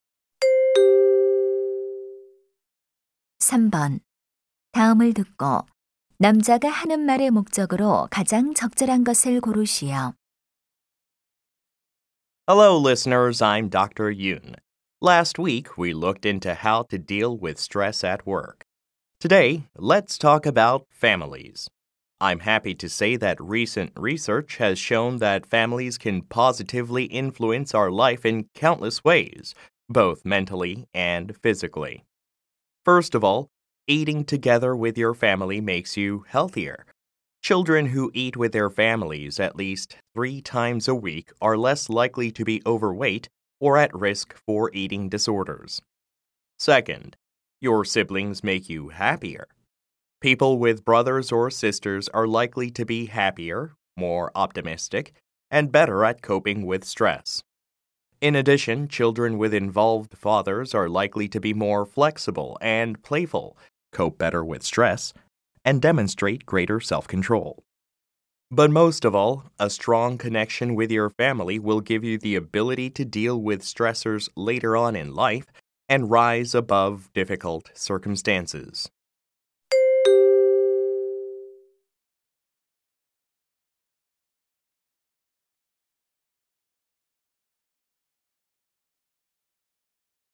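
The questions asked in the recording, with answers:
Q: 다음을 듣고 남자가 하는 말의 목적으로 가장 적절한 것을 고르시오.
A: 가족이 삶에 미치는 긍정적 영향을 알리려고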